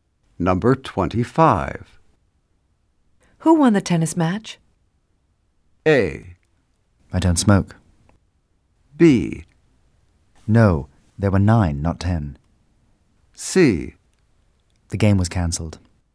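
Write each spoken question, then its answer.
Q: Who won the tennis match?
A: C: The game was cancelled.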